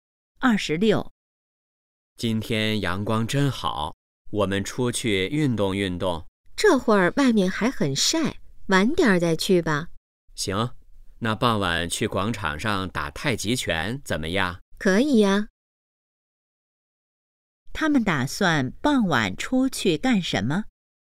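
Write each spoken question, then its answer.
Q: 他们打算傍晚出去干什么?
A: 打太极拳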